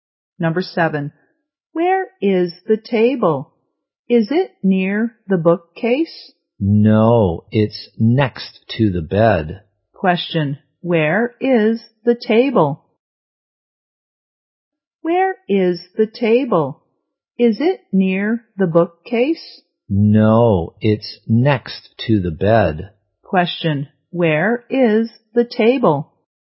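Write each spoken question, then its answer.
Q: Where is the table?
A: Next to the bed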